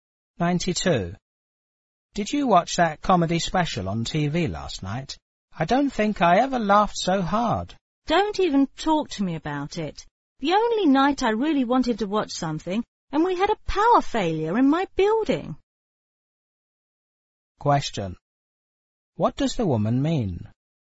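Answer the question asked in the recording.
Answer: She missed the comedy special because of a power failure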